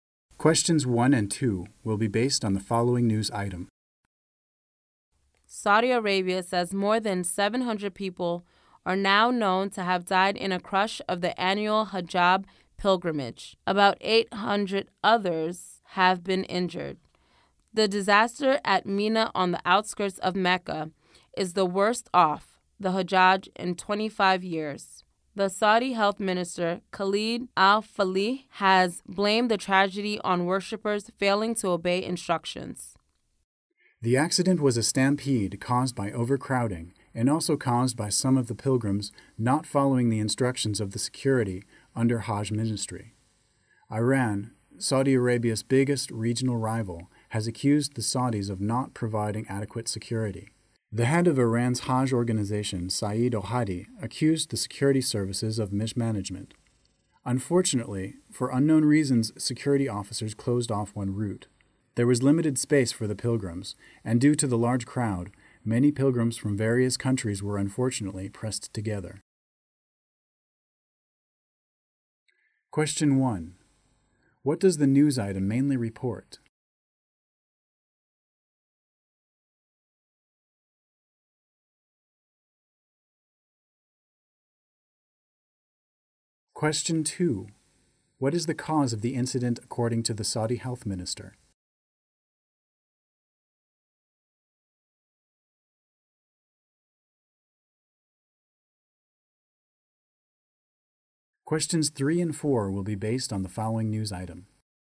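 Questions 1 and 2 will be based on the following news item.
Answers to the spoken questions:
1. More than 700 people died in a crush during the Hajj pilgrimage
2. Worshippers failing to obey instructions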